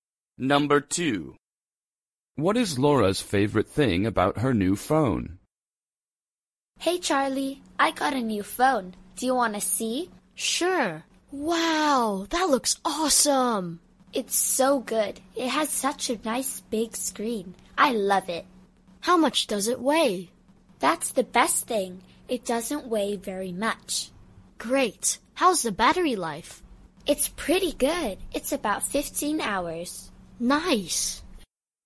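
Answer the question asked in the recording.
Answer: It doesn't weigh very much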